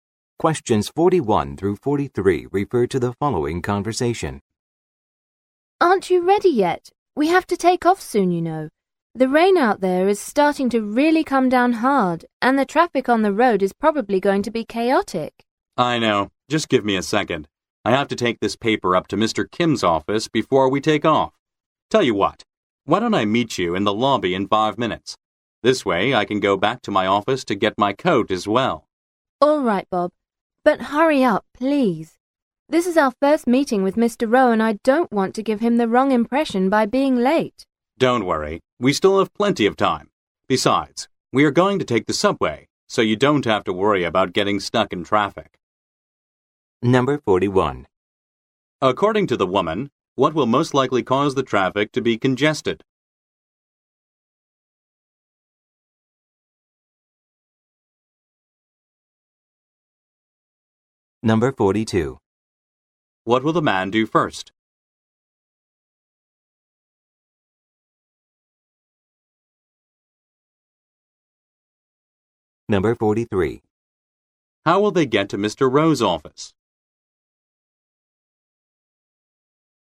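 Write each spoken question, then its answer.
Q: What will most likely cause the traffic to be congested?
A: The heavy rain

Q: What will the man do first?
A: Take a paper to Mr. Kim's office

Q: How will they get to Mr. Rowe's office?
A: By subway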